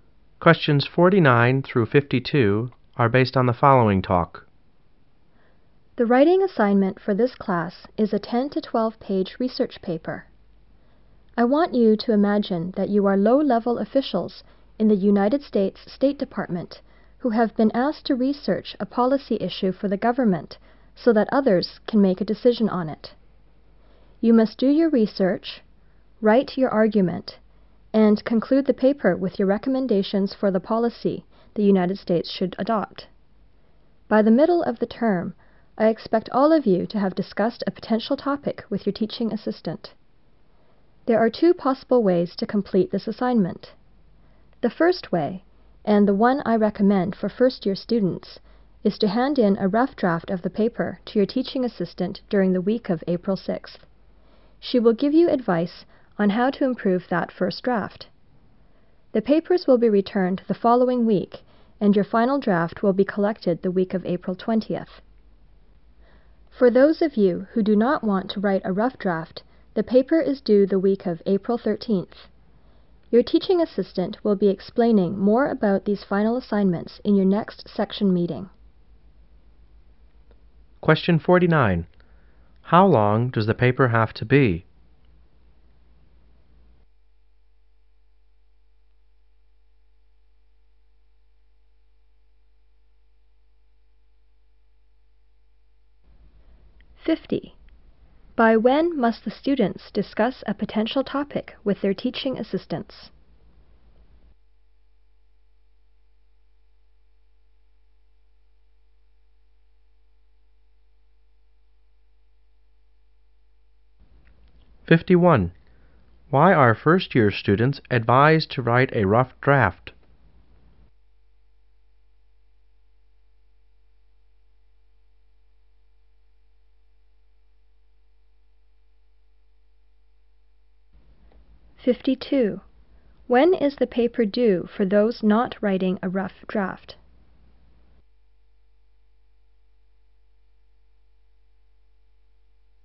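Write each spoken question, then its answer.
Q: How long does the paper have to be?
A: 10 to 12 pages

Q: By when must the students discuss a potential topic with their teaching assistants?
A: By the middle of the term

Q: Why are first-year students advised to write a rough draft?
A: To get advice on how to improve it

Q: When is the paper due for those not writing a rough draft?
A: The week of April 13th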